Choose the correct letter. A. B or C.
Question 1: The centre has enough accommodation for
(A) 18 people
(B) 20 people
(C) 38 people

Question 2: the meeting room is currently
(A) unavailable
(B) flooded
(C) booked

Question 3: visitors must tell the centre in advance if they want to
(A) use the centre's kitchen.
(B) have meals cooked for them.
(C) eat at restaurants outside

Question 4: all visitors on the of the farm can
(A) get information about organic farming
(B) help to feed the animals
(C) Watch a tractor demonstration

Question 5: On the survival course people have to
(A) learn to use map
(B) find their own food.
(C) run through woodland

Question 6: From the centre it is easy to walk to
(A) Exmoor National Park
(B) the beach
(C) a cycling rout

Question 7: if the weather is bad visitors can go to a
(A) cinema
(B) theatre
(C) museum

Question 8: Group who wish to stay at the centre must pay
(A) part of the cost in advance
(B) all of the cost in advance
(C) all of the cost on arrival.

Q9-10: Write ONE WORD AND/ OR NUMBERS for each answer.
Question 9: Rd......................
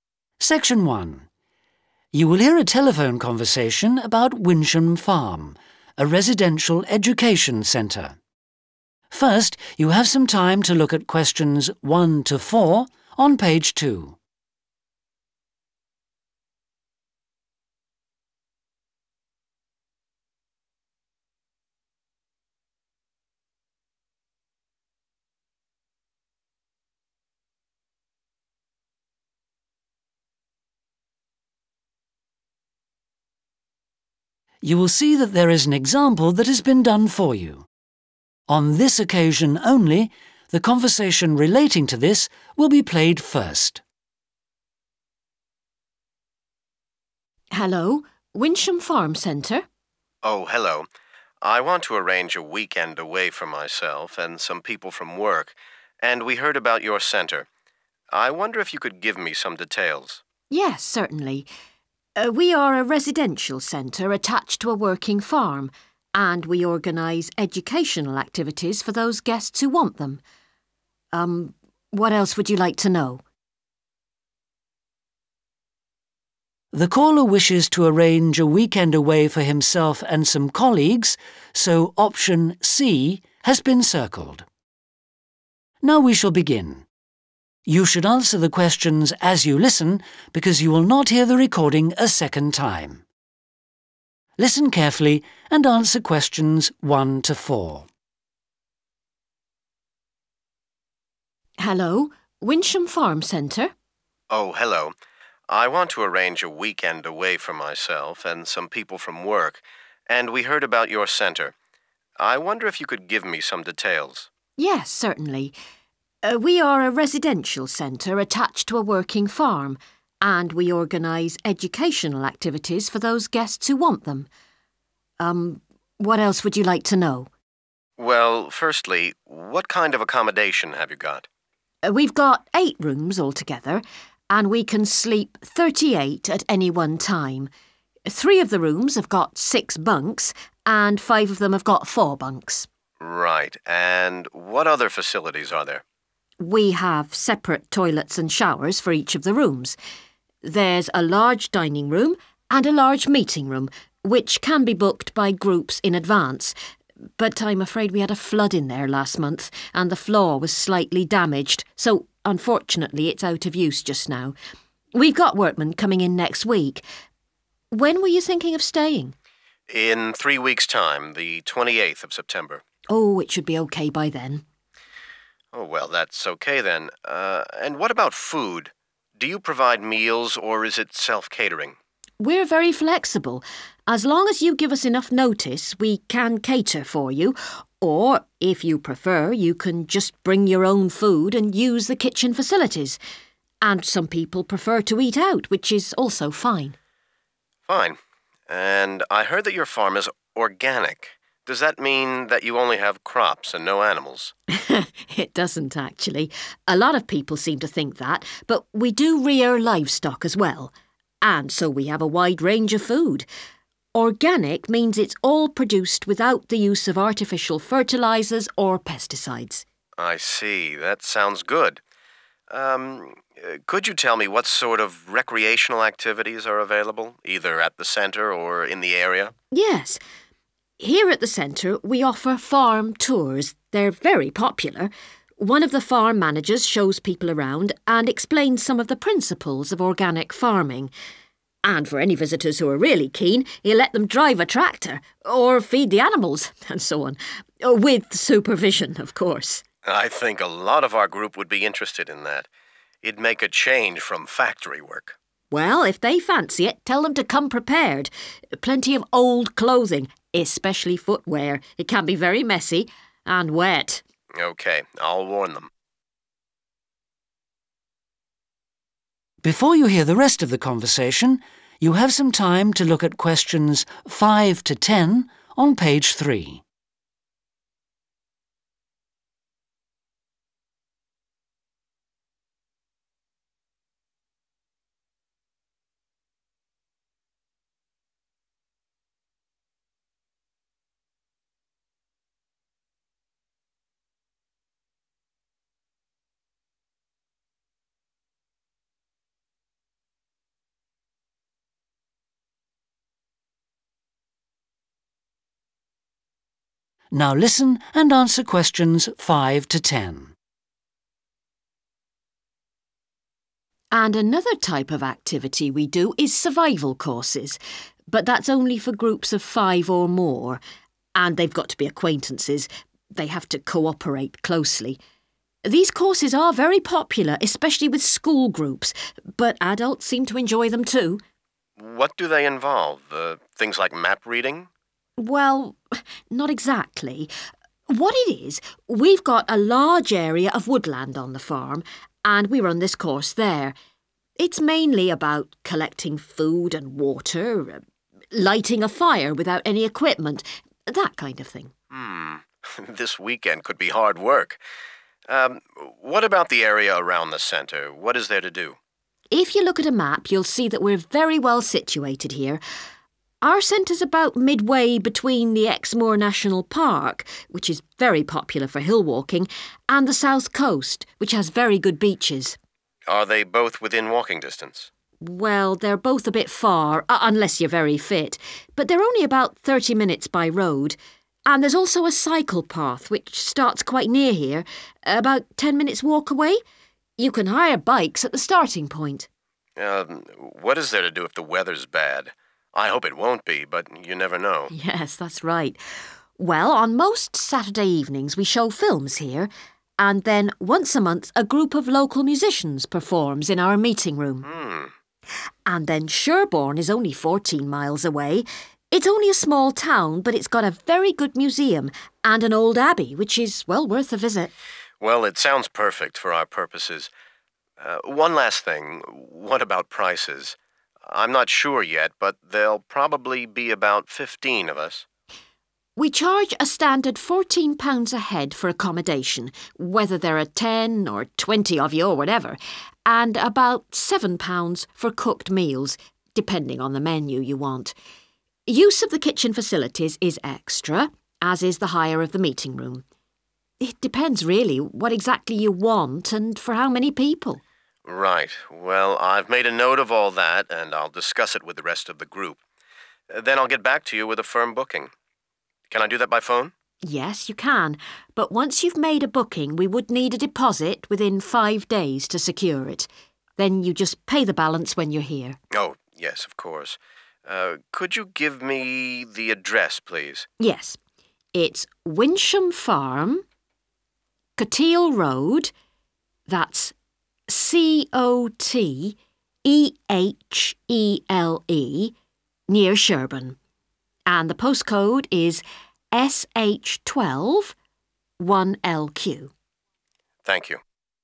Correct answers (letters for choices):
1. C
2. A
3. B
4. A
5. B
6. C
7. C
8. A
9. Cotehele